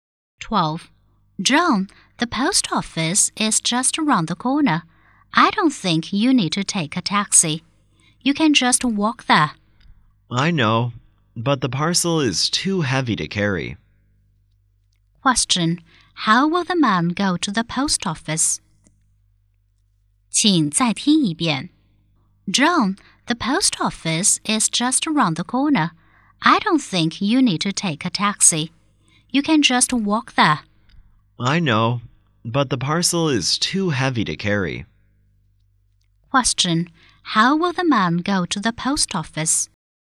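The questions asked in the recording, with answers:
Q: How will the man go to the post office?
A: By taxi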